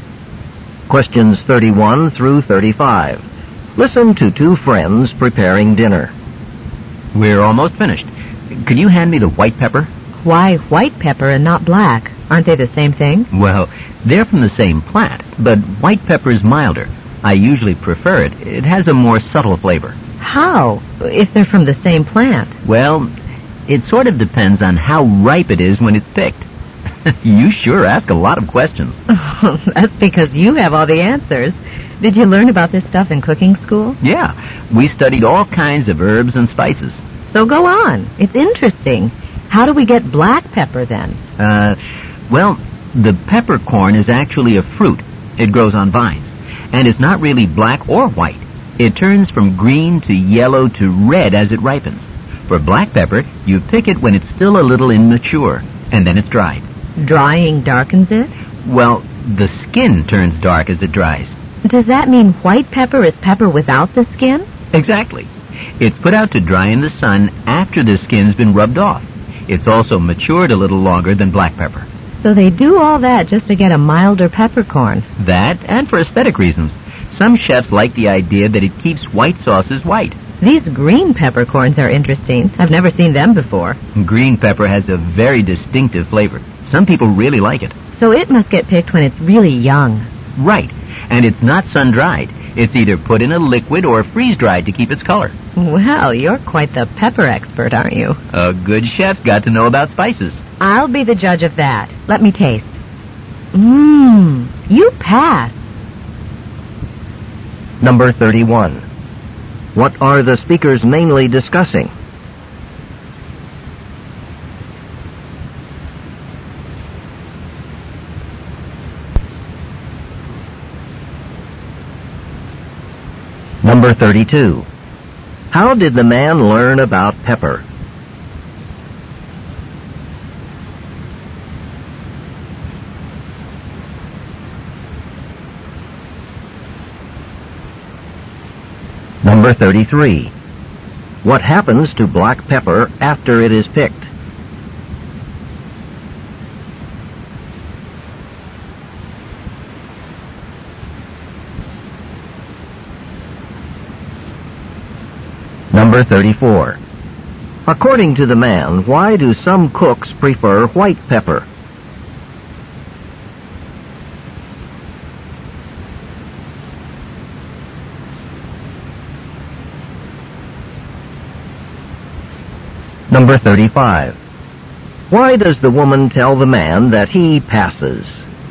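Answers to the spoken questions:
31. How different kinds of pepper are produced
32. In cooking school
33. It is dried, which darkens its skin.
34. It keeps white sauces white.
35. The food he made tastes good.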